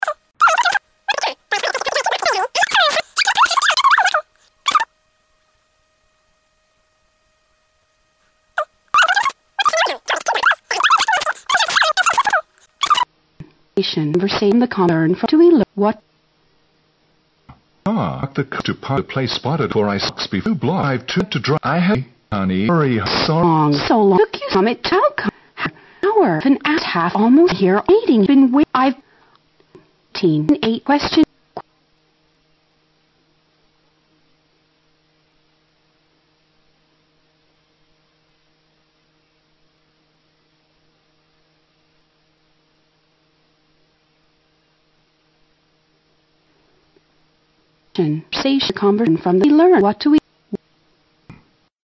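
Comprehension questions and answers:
What do we learn from the conversation?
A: The man had a hard time finding a parking space.

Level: 大学英语四级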